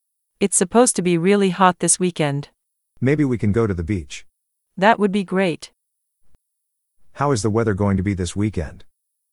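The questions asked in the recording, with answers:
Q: How is the weather going to be this weekend?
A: Really hot.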